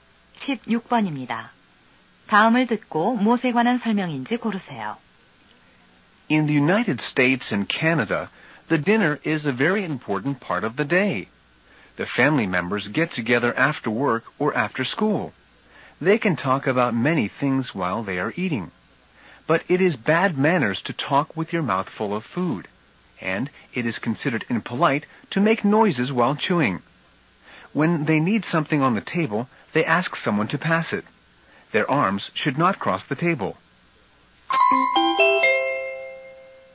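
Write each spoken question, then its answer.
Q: 다음을 듣고 무엇에 관한 설명인지 고르세요.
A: 미국과 캐나다의 식사 예절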